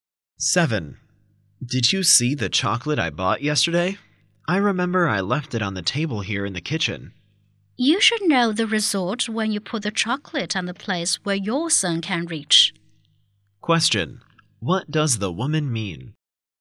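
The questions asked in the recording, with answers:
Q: What does the woman mean?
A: Their son probably ate the chocolate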